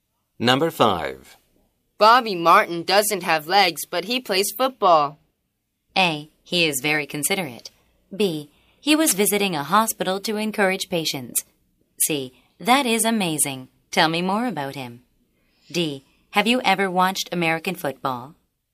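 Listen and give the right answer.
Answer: C: That is amazing. Tell me more about him.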